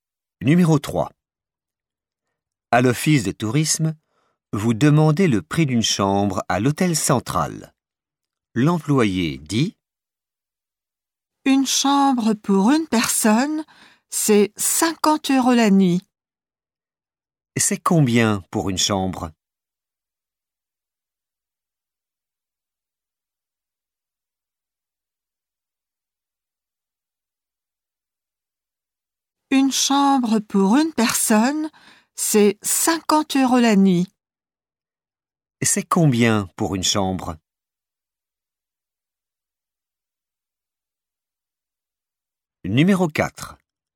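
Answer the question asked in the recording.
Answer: 50 euros la nuit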